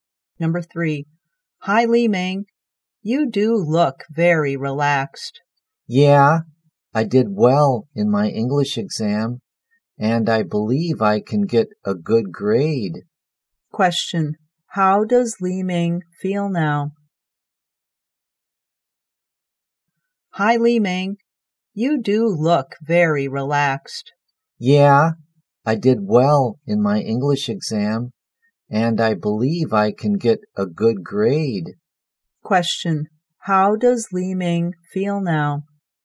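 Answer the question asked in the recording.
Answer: Relaxed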